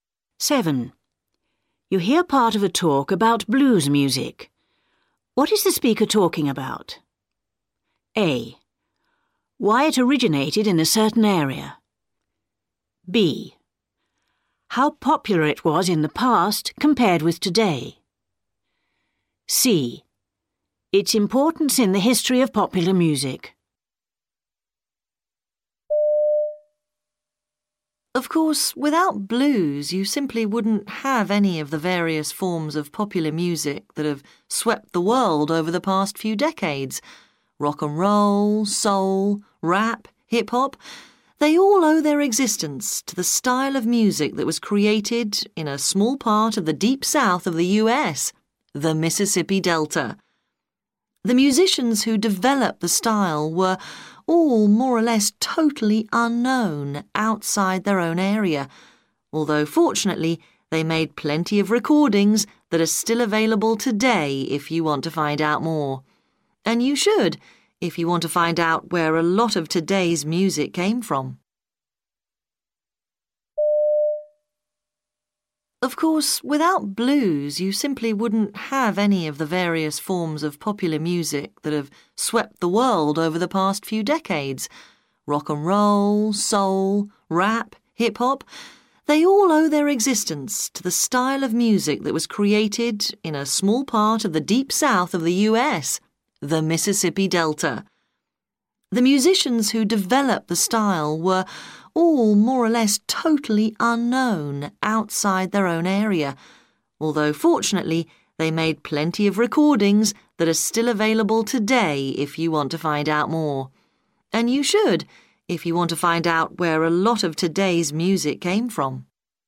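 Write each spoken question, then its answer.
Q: What is the speaker talking about?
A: C: Its importance in the history of popular music.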